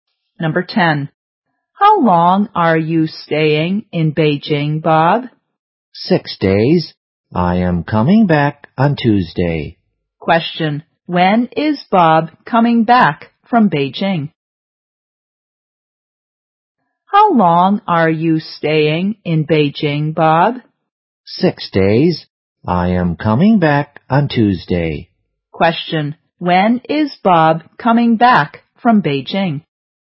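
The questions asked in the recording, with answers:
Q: When is Bob coming back from Beijing?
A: On Tuesday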